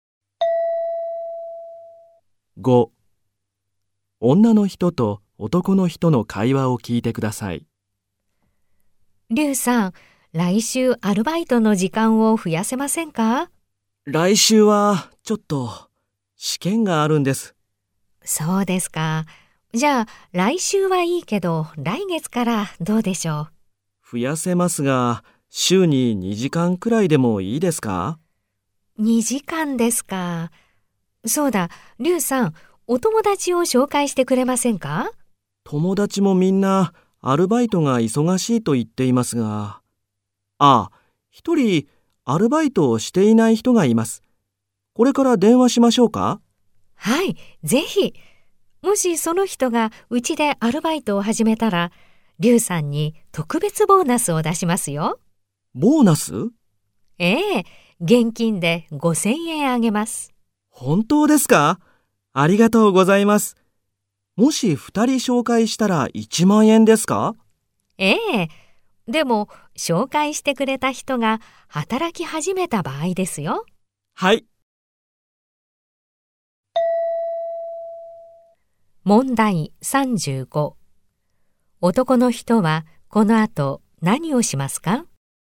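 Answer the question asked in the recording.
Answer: 友達に電話します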